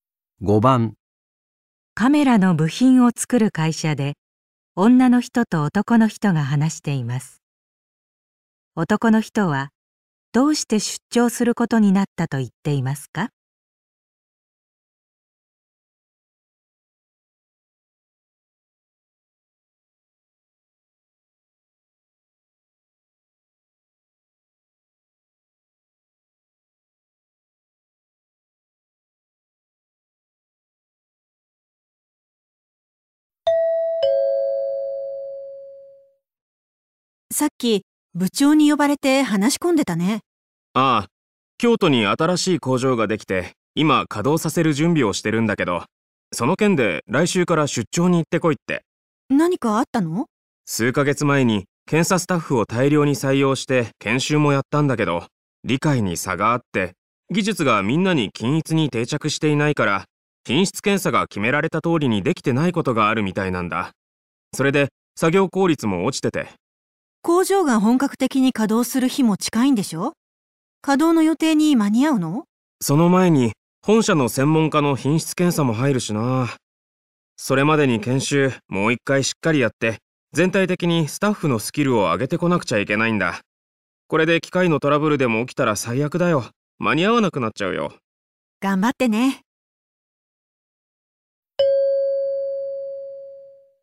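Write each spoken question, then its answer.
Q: 男の人はどうして出張することになったと言っていますか?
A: 新工場の検査スタッフの研修をもう一度行い、スキルを上げるため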